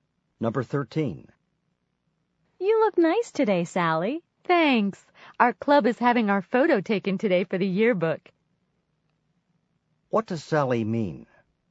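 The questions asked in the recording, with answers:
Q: What does Sally mean?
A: She dressed nicely because her club's yearbook photo is being taken today.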